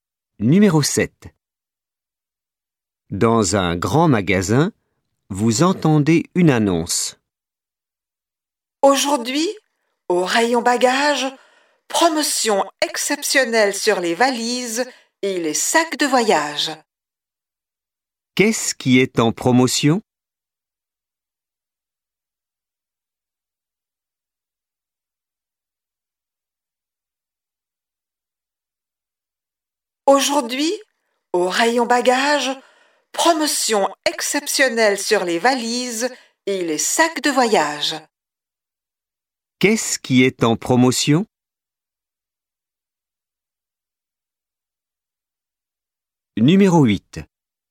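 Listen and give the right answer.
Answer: Les valises et les sacs de voyage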